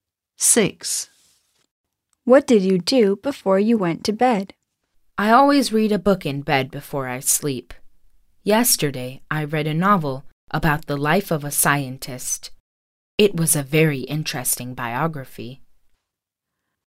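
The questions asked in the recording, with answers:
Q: What did you do before you went to bed?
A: Read a book (a biography of a scientist)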